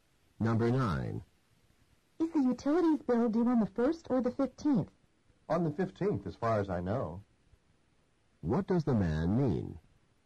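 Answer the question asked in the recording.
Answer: He thinks the bill is due on the 15th, but isn't certain.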